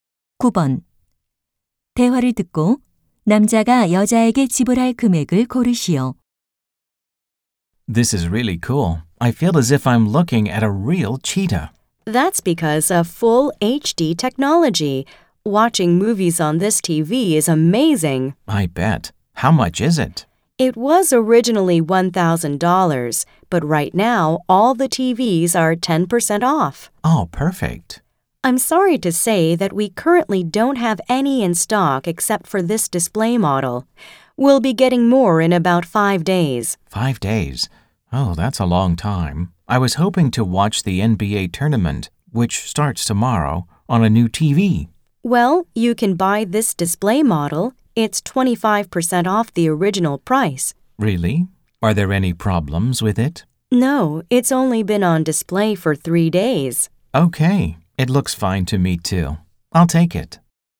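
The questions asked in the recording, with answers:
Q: 대화를 듣고 남자가 여자에게 지불할 금액을 고르시오.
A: 750달러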